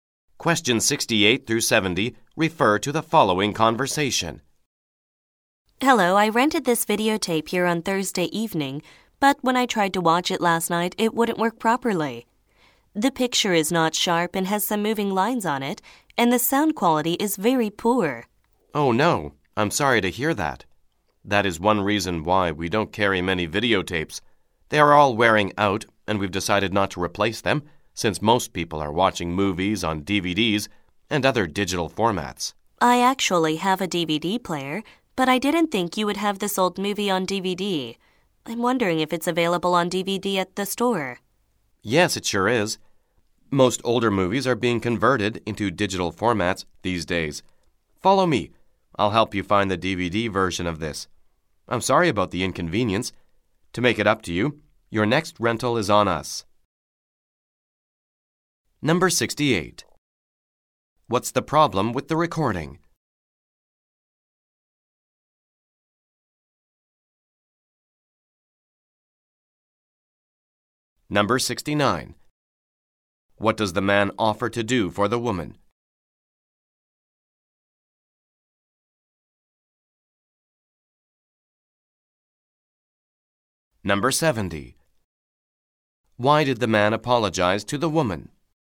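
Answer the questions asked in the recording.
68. The videotape has a poor picture and sound
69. Help her find the DVD and give her a free next rental
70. Because the videotape she rented didn't work properly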